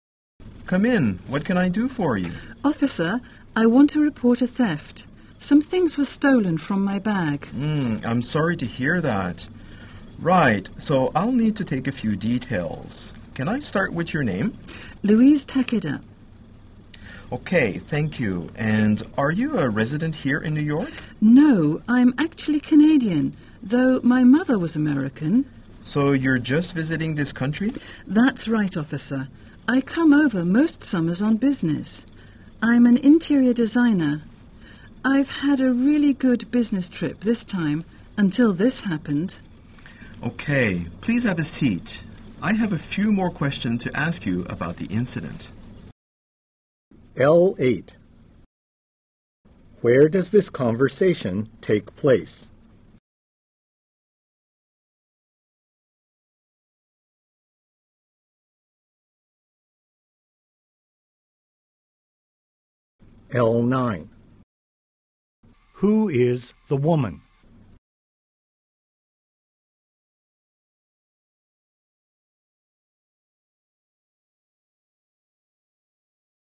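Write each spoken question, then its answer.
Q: Where does this conversation take place?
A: At a police station

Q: Who is the woman?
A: A Canadian interior designer visiting New York on business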